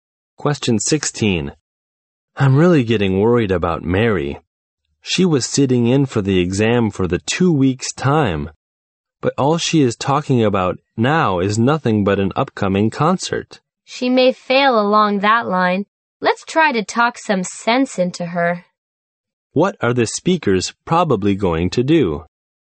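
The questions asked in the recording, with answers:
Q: What are the speakers probably going to do?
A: Talk to Mary and persuade her to focus on her exam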